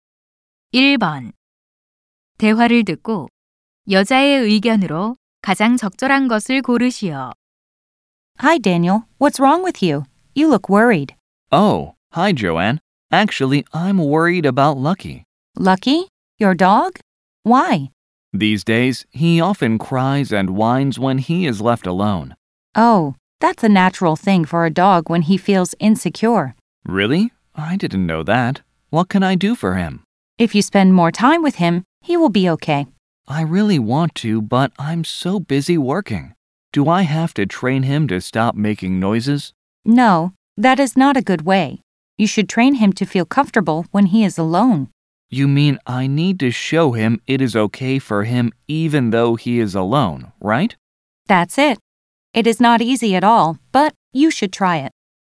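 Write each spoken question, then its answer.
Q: 대화를 듣고 여자의 의견으로 가장 적절한 것을 고르시오.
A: 개가 혼자 있을 때 편안하게 느끼도록 훈련시켜야 한다.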